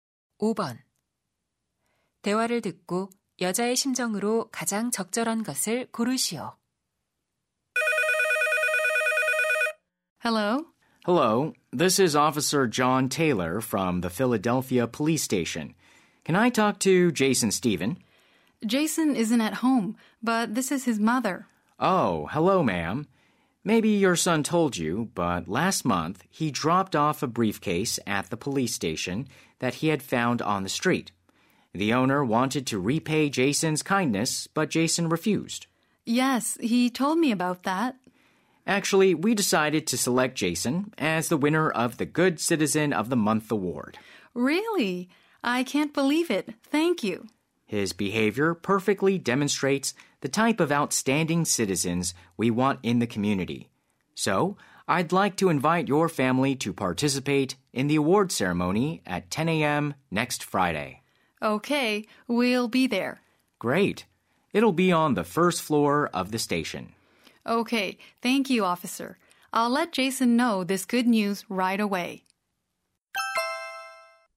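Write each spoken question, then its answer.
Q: 대화를 듣고 여자의 심정으로 가장 적절한 것을 고르시오.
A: 기쁘고 자랑스러움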